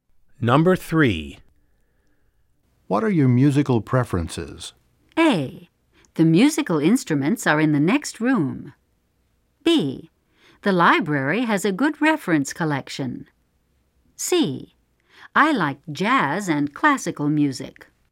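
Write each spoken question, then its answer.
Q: What are your musical preferences?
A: C: I like jazz and classical music.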